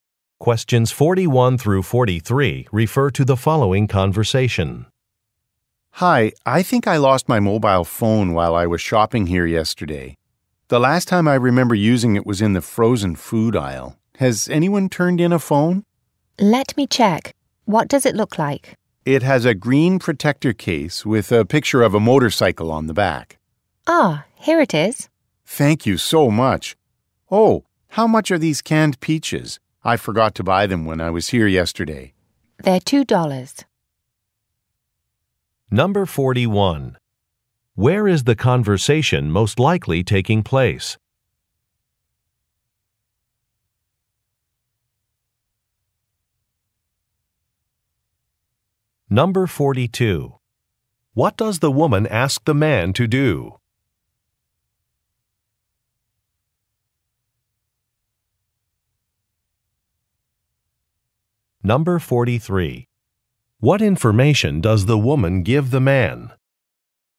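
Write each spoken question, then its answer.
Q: Where is the conversation most likely taking place?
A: At a grocery store (supermarket)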